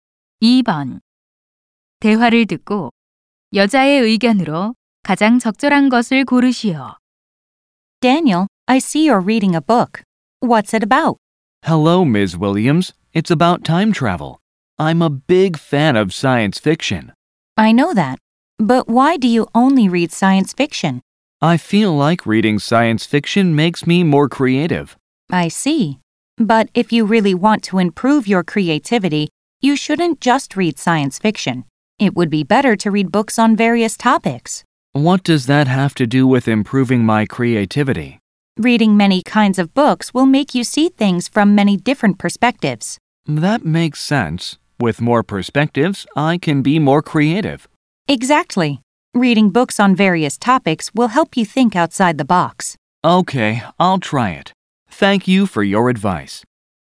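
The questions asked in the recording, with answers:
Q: 대화를 듣고 여자의 의견으로 가장 적절한 것을 고르시오.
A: 다양한 주제의 책을 읽으면 창의력 향상에 도움이 된다.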